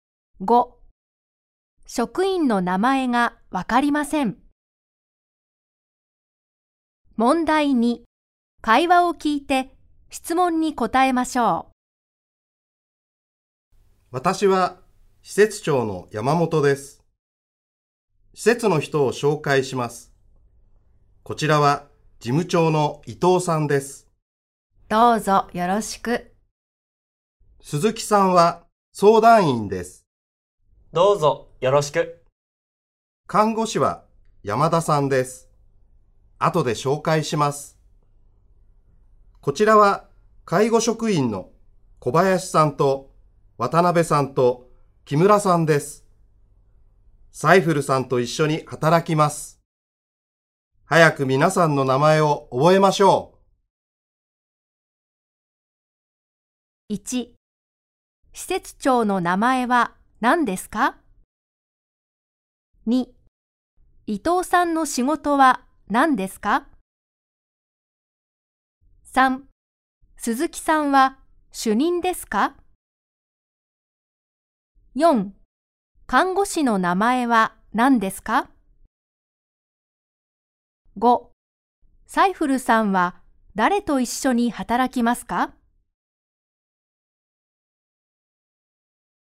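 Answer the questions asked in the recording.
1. 山本さん
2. 事務長
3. いいえ、相談員です
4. 山田さん
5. 小林さんと渡辺さんと木村さん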